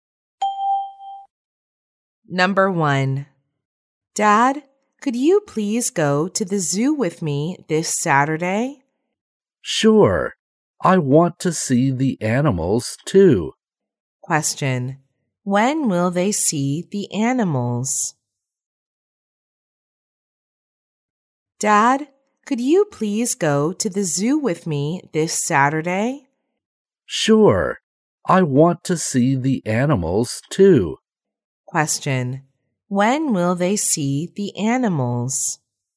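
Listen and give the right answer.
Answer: This Saturday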